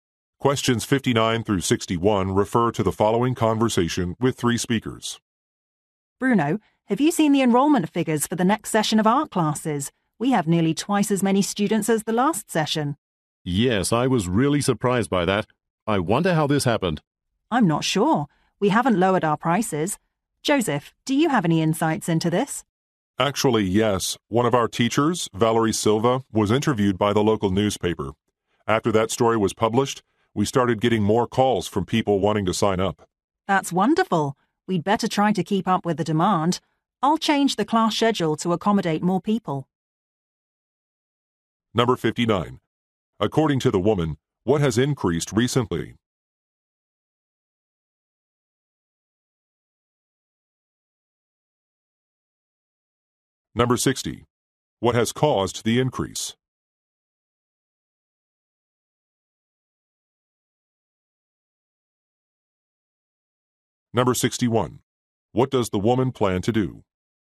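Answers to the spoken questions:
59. Enrollment in art classes
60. A newspaper interview with a teacher
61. Change the class schedule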